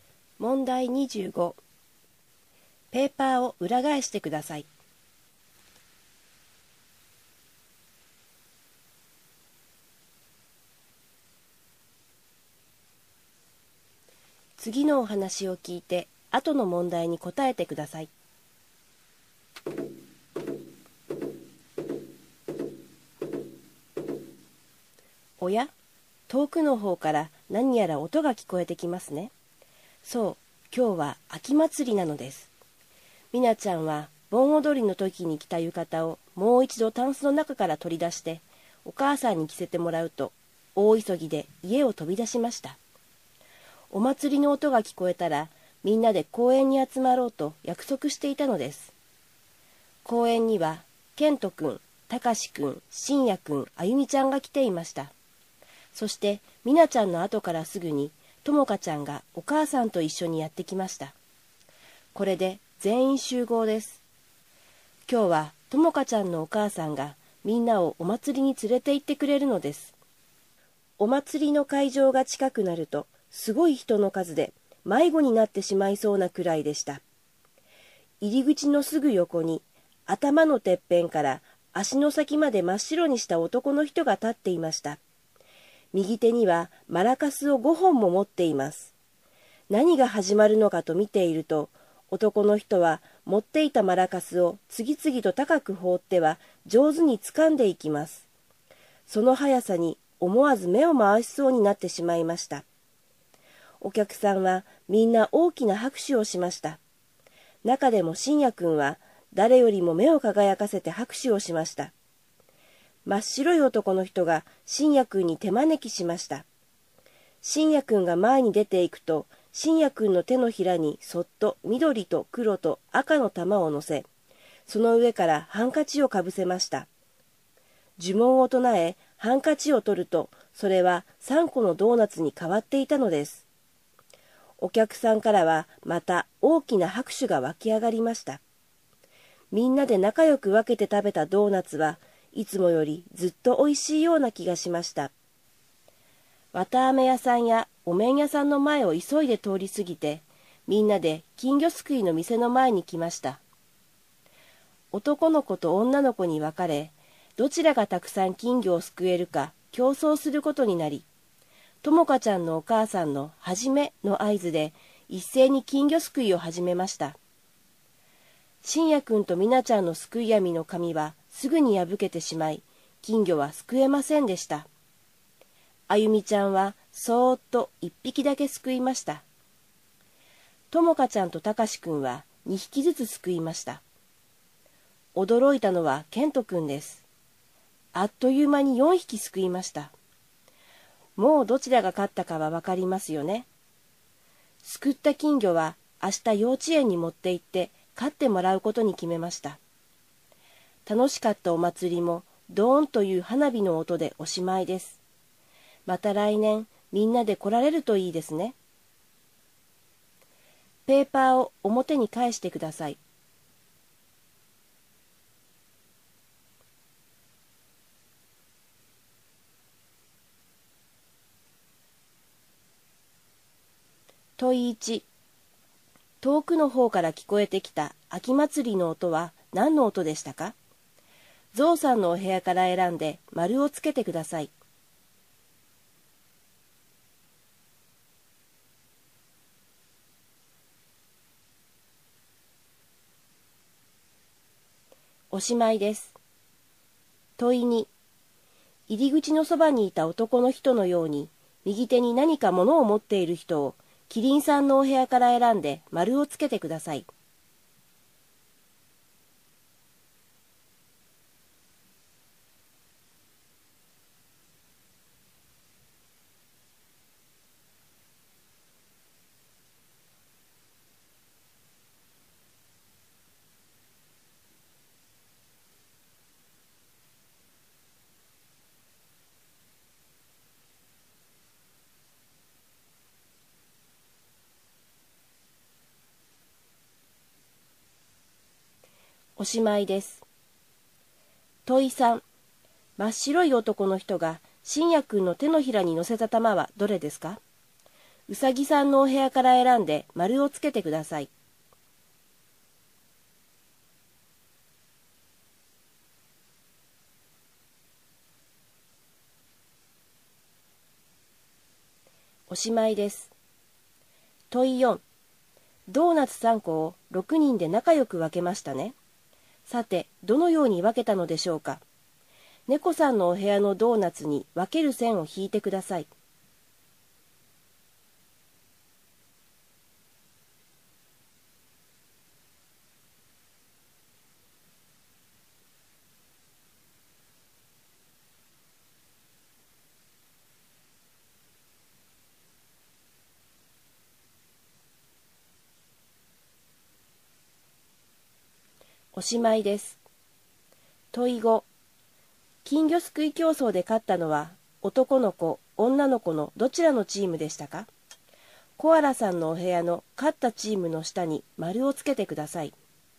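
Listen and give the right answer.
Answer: 男の子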